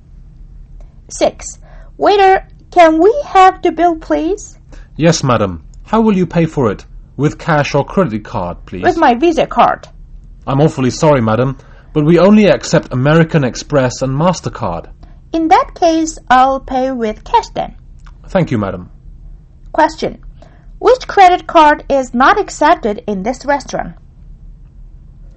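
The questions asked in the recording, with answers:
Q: Which credit card is not accepted in this restaurant?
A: Visa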